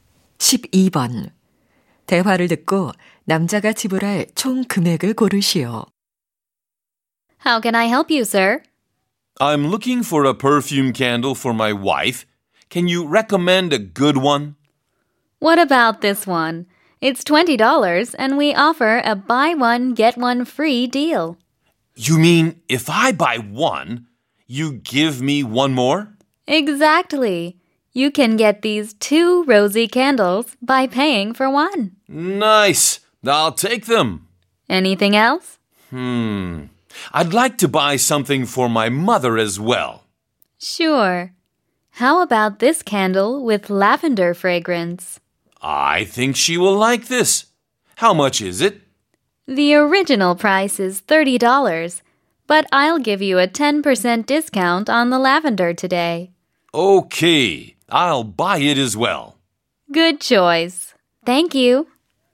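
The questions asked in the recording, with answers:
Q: 대화를 듣고 남자가 지불할 총 금액을 고르시오.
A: 47달러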